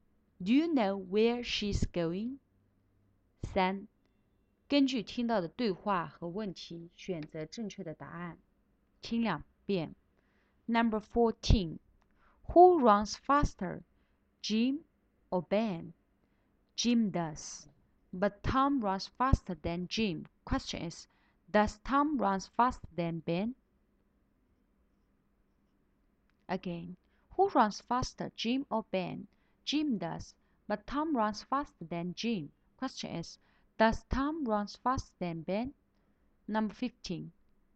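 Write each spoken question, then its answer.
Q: Question is, does Tom run faster than Ben?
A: Yes, he does.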